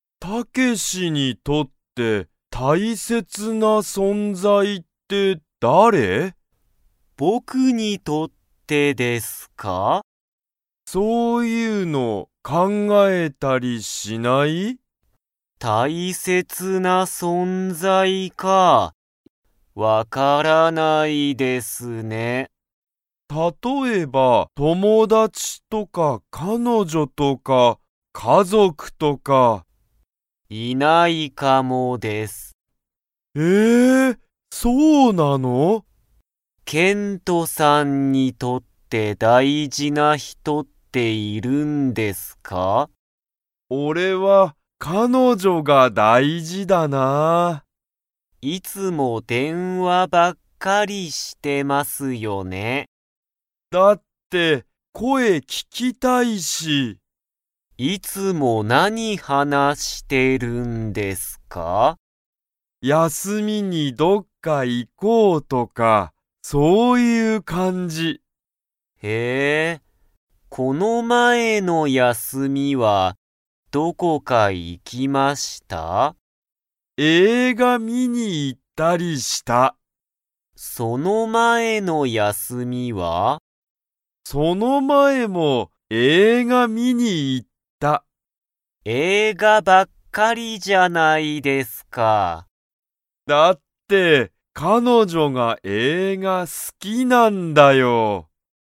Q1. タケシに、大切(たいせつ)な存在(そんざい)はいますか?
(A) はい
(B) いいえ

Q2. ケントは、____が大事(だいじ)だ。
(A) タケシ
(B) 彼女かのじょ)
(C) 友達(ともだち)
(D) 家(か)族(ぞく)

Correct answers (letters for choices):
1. B
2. B

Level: Level 2